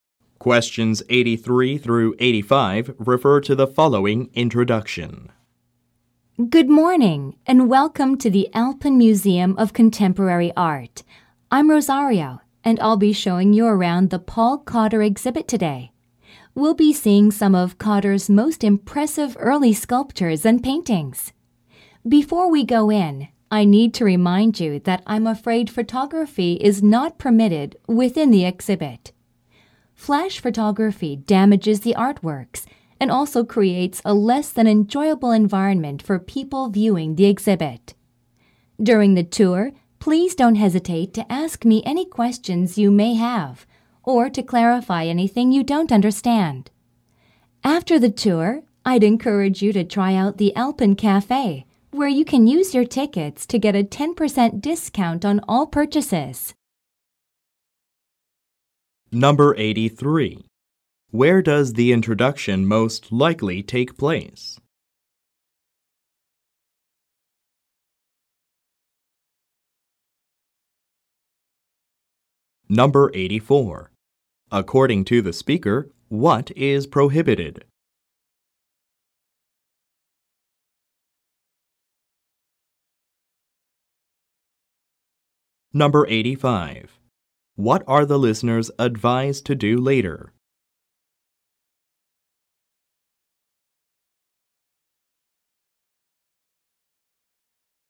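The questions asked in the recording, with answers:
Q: Where does the introduction most likely take place?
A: At an art museum

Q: According to the speaker, what is prohibited?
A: Taking photographs

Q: What are the listeners advised to do later?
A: Visit the Alpen Cafe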